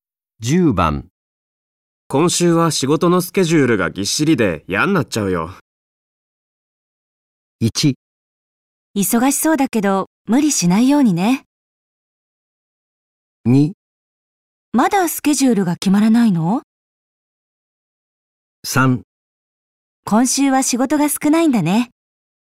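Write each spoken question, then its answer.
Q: 今週は仕事のスケジュールがぎっしりで嫌になっちゃうよ。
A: 1: 忙しそうだけど無理しないようにね。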